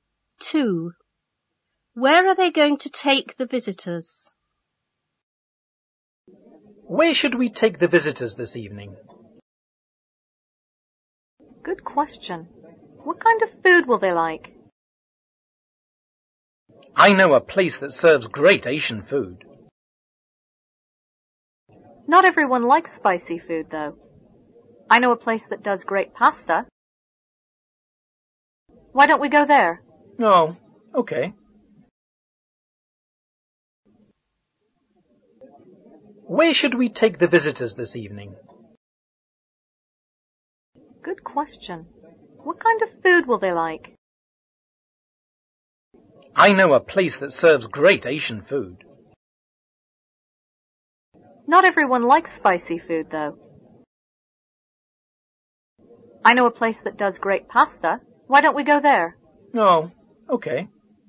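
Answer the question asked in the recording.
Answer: To a pasta (Italian) restaurant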